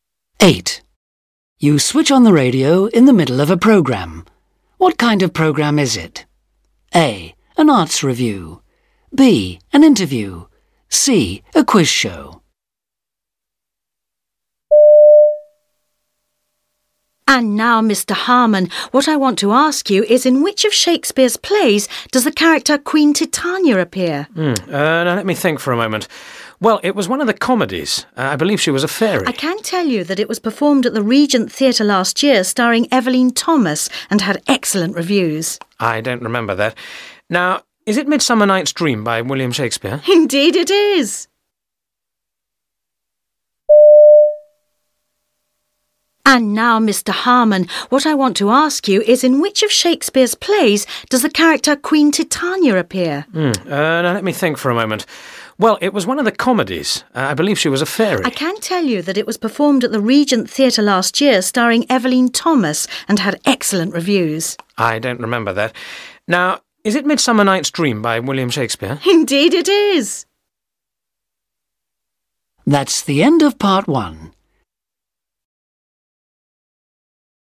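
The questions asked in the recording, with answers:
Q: What kind of programme is it?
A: C: A quiz show.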